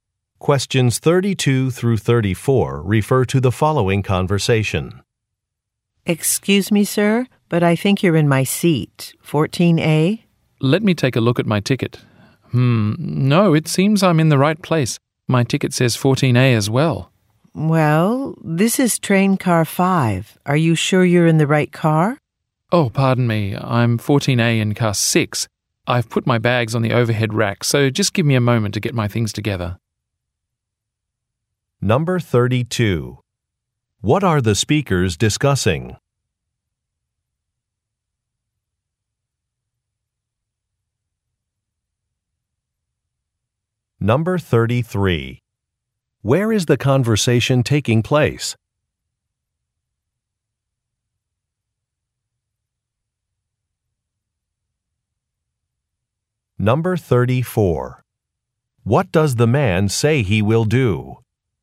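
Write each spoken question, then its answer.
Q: What are the speakers discussing?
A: A seat assignment mix-up

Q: Where is the conversation taking place?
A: On a train

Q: What does the man say he will do?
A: Gather his belongings from the overhead rack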